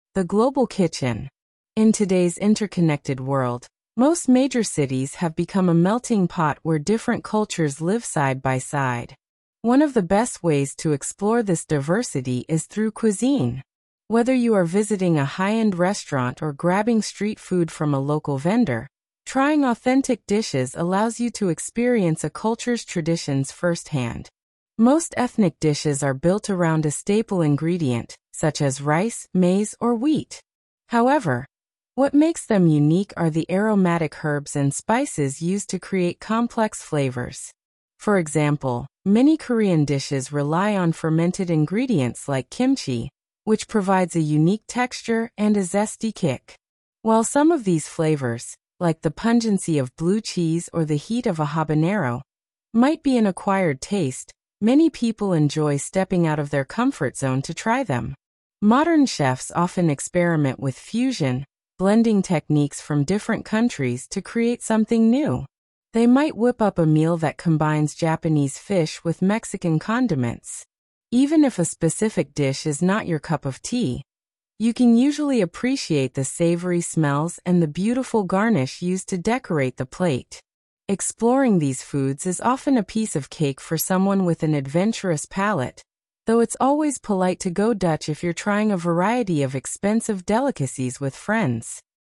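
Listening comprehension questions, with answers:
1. What does the term "melting pot" suggest about food in modern society?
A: Different cultures live side by side, so food from many cultures can be found in major cities.

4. According to the text, what is a major benefit of trying ethnic foods?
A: It lets you experience a culture's traditions firsthand.

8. If you are "stepping out of your comfort zone," what are you doing?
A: Trying unfamiliar flavors that may be an acquired taste.

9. Why might someone use a "garnish" on a plate of food?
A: To decorate the plate.

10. Give an example of a "fermented" food.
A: Kimchi

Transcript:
The Global Kitchen
In today's interconnected world, most major cities have become a melting pot where different cultures live side by side. One of the best ways to explore this diversity is through cuisine. Whether you are visiting a high-end restaurant or grabbing street food from a local vendor, trying authentic dishes allows you to experience a culture's traditions firsthand.
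Most ethnic dishes are built around a staple ingredient, such as rice, maize, or wheat. However, what makes them unique are the aromatic herbs and spices used to create complex flavors. For example, many Korean dishes rely on fermented ingredients like kimchi, which provides a unique texture and a zesty kick. While some of these flavors—like the pungency of blue cheese or the heat of a habanero—might be an acquired taste, many people enjoy stepping out of their comfort zone to try them.
Modern chefs often experiment with fusion, blending techniques from different countries to create something new. They might whip up a meal that combines Japanese fish with Mexican condiments. Even if a specific dish is not your cup of tea, you can usually appreciate the savory smells and the beautiful garnish used to decorate the plate. Exploring these foods is often a piece of cake for someone with an adventurous palate, though it's always polite to go Dutch if you're trying a variety of expensive delicacies with friends!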